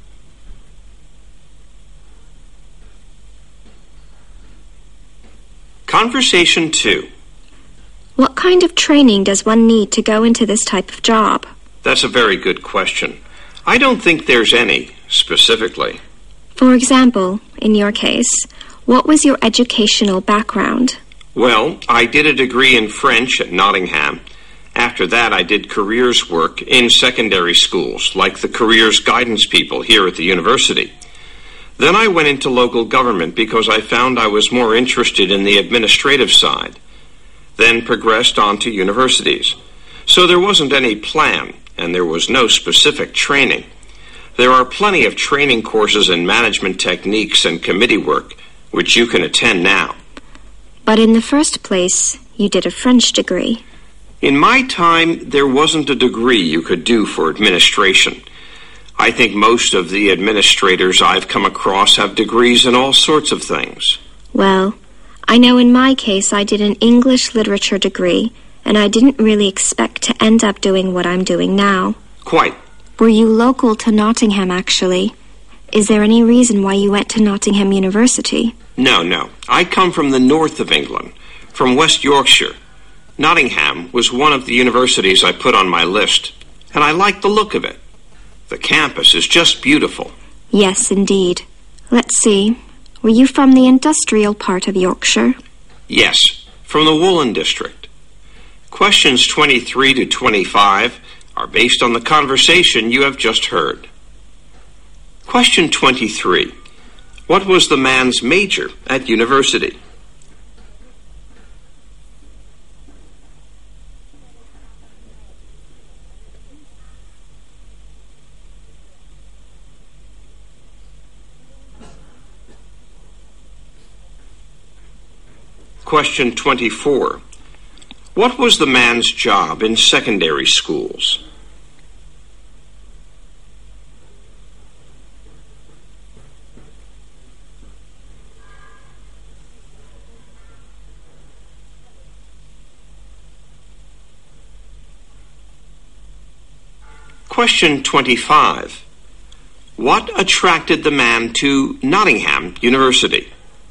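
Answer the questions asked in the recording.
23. French
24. Careers guidance work
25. Its beautiful campus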